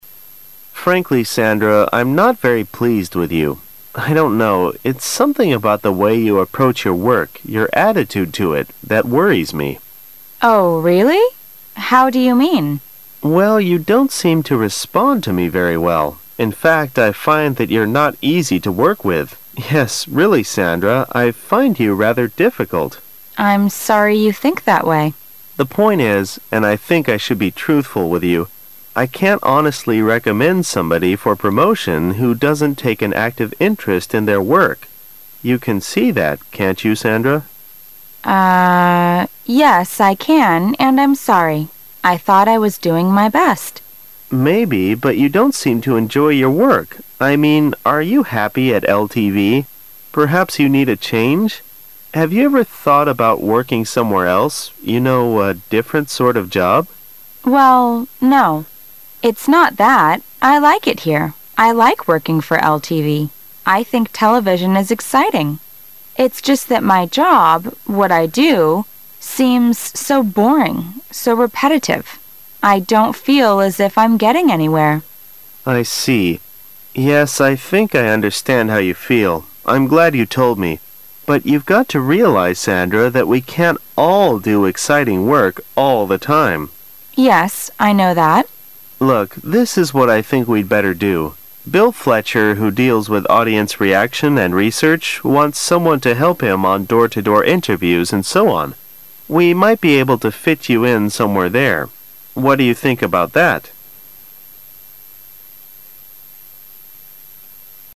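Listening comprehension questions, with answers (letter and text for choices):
Questions 11 - 13 are based on the following dialogue.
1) How can you describe the man talking to Sandra?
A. Frank and rude,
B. Hesitant and caring.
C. Straightforward and understanding.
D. Careless and rude.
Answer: C. Straightforward and understanding.

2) What job does the man recommend Sandra to do?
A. News reporter.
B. Secretary.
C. TV program producer.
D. Door-to-door interview on audience reaction.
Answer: D. Door-to-door interview on audience reaction.

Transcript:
A
[解析] 11-13 M: Frankly, Sandra, I'm not very pleased with you. I don't know -- it's something about the way you approach your work, your attitude to it, that worries me. W: Oh, really? How do you mean? M: Well, you don't seem to respond to me very well. In fact I find that you're not easy to work with. Yes, re ally Sandra, I find you rather difficult. 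W: I'm sorry you think that way. M: The point is -- and I think I should be truthful with you, I can't honestly recommend somebody for pro motion who doesn't take an active interest in their work. You can see that, can't you Sandra? yes I can and I'm sorry. I thought I was doing my best. M: Maybe, but you don't seem to enjoy your work. I mean, are you happy at LTV? Perhaps you need a change. Have you ever thought about working somewhere else? You know, a different sort of job. W: Well, no. It's not that. I like it here. I like working for LTV. I think television is exciting. It's just that my job, what I do, seems so boring, so repetitive. I don't feel as if I'm getting anywhere. M: I see. Yes, I think I understand how you feel. I'm glad you told me. But you've got to realize, Sandra, that we can't all do exciting work all the time. W: Yes, I know that. M: Look, this is what I think we'd better do. 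Bill Fletcher who deals with audience reaction and research wants someone to help him on door-to-door interviews and so on. We might be able to fit you in some where there. What do you think about that?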